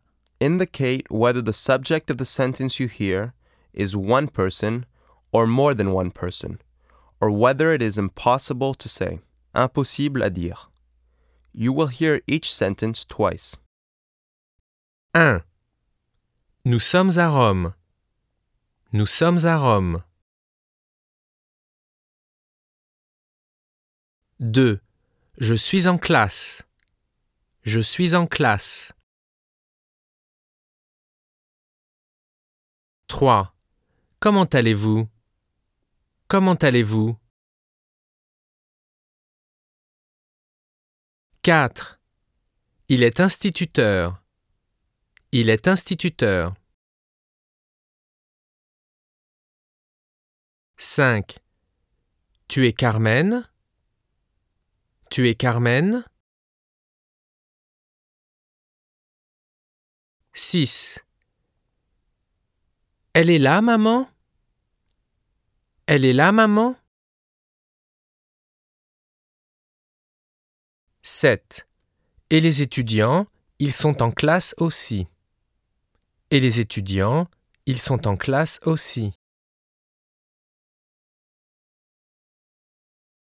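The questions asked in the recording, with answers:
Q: Nous sommes à Rome.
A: more than one person

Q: Je suis en classe.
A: one person

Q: Comment allez-vous?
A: impossible to say

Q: Il est instituteur.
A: one person

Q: Tu es Carmen?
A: one person

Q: Elle est là, maman?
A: one person

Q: Et les étudiants, ils sont en classe aussi.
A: more than one person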